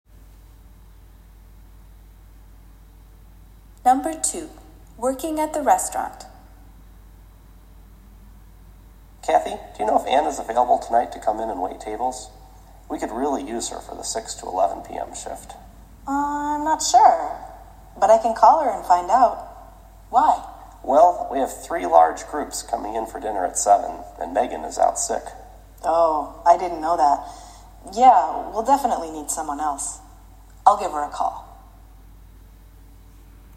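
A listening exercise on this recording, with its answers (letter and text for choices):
Why does the man want Kathy to make a phone call?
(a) He needs to change a customer's reservation.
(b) He needs to bring in another employee.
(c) He wants to order extra food for tonight.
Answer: (b) He needs to bring in another employee.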